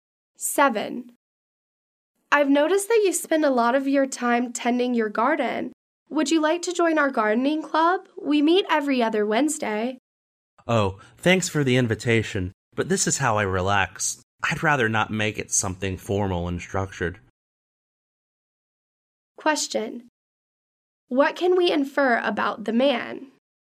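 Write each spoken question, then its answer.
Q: What can we infer about the man?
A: He gardens to relax and doesn't want to join the club.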